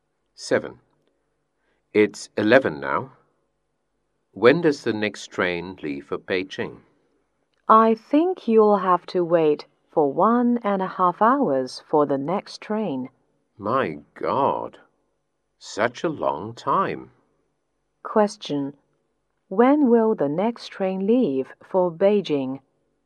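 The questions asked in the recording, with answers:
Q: When will the next train leave for Beijing?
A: At 12:30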